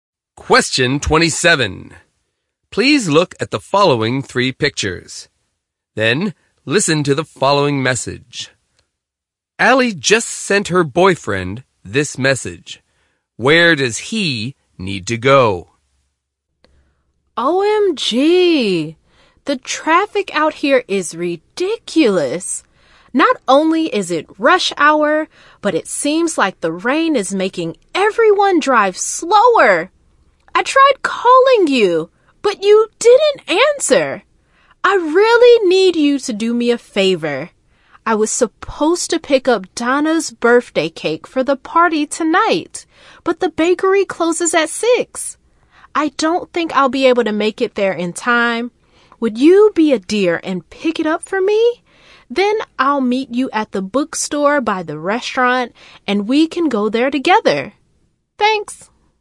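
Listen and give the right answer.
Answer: To the bakery to pick up the birthday cake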